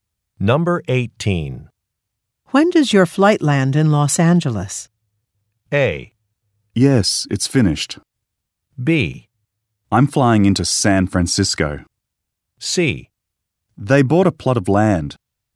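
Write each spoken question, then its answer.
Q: When does your flight land in Los Angeles?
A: B: I'm flying into San Francisco.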